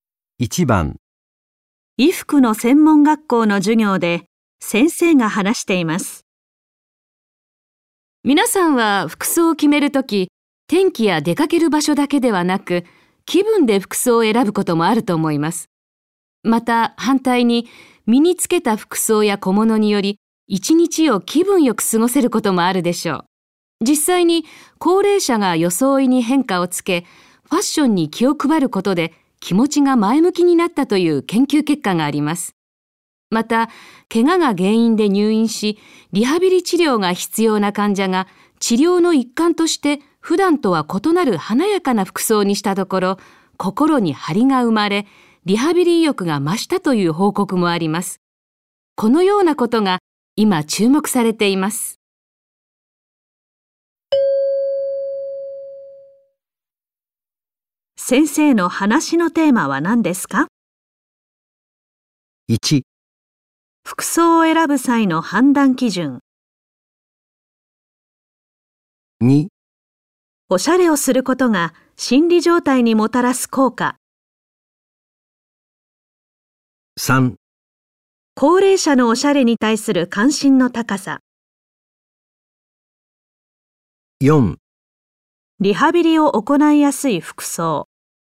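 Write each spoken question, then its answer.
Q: 先生の話のテーマは何ですか?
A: 2: おしゃれをすることが心理状態にもたらす効果。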